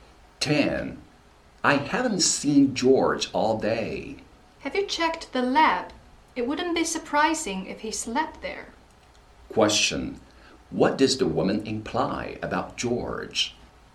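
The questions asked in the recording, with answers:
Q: Question. What does the woman imply about George?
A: He may be in the lab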